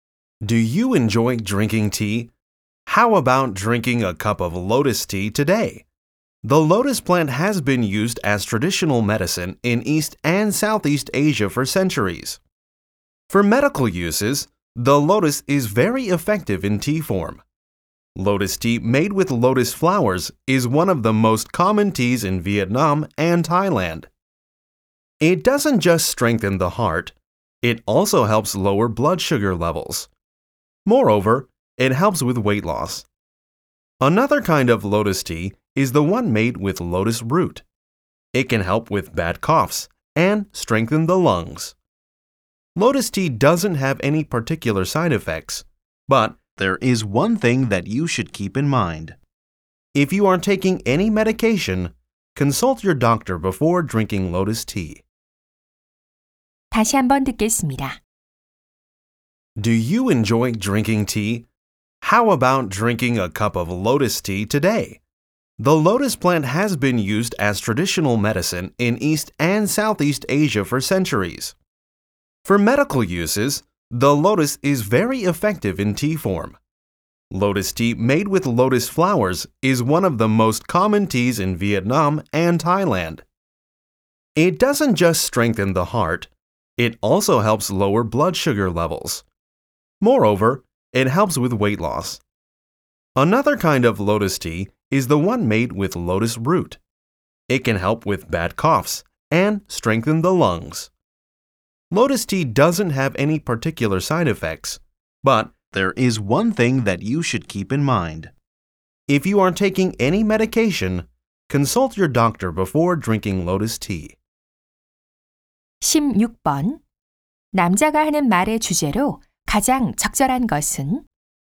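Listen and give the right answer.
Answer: 연꽃차의 건강상 효능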